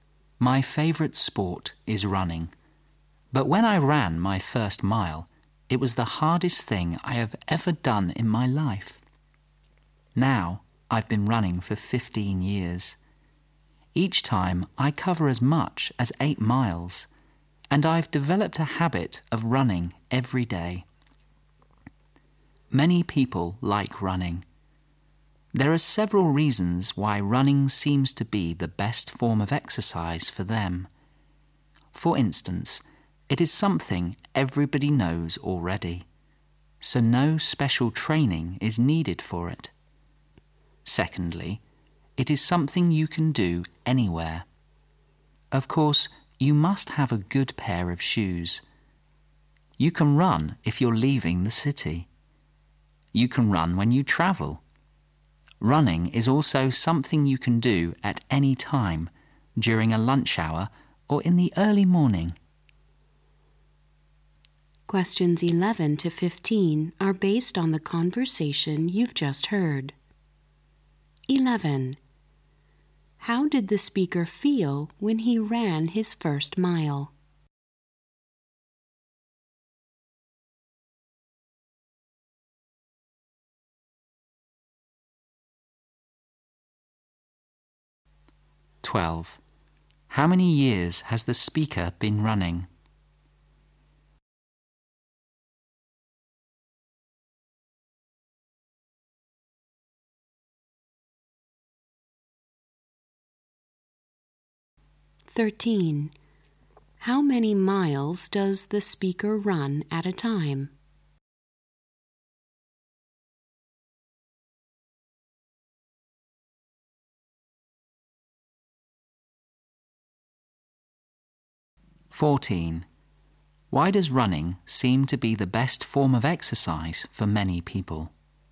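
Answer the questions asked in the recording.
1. It was the hardest thing
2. 15 years
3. 8 miles
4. No special training is needed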